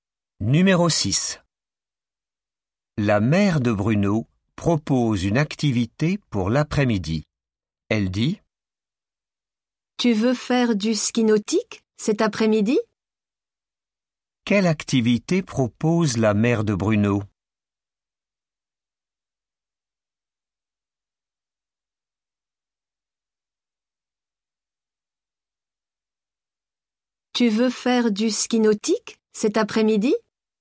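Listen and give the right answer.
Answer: du ski nautique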